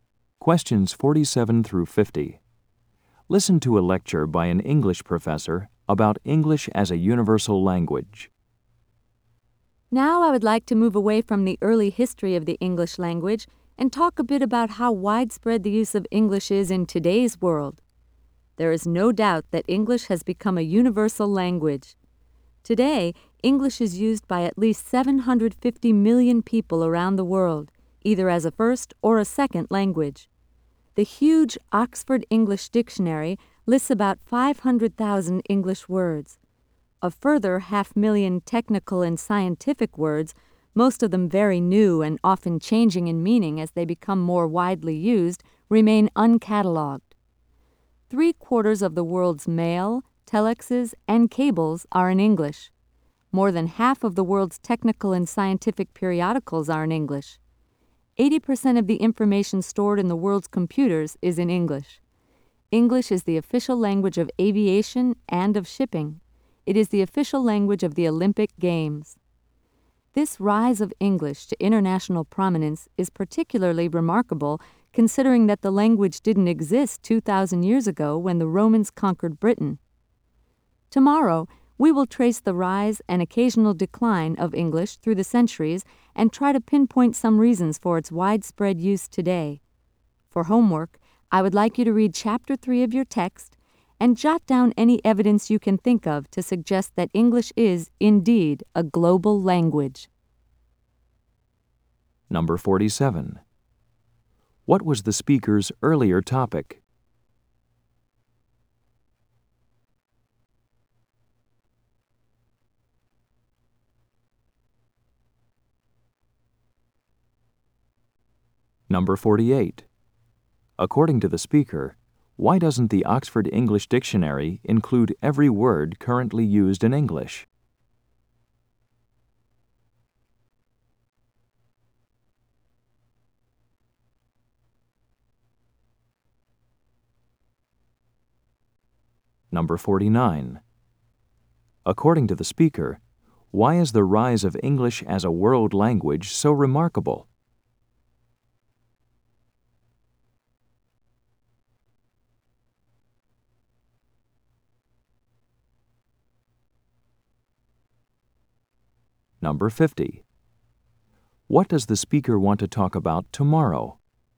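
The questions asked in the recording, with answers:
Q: What was the speaker's earlier topic?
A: The early history of the English language

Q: According to the speaker, why doesn't the Oxford English Dictionary include every word currently used in English?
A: Many technical and scientific words are very new and change in meaning

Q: According to the speaker, why is the rise of English as a world language so remarkable?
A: The language didn't exist 2,000 years ago

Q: What does the speaker want to talk about tomorrow?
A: The rise and decline of English through the centuries and reasons for its widespread use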